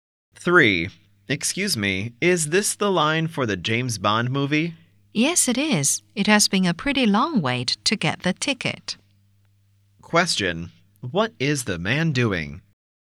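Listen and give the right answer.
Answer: Waiting in line for a movie ticket.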